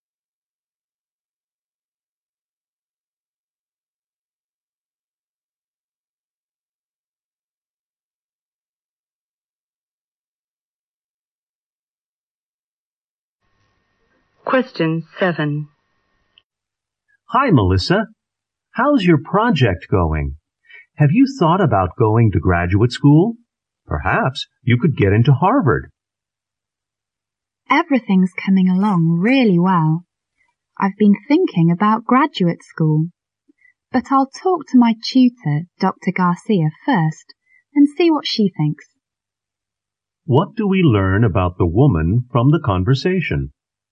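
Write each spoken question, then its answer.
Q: What do we learn about the woman from the conversation?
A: She will talk to her tutor before deciding about graduate school.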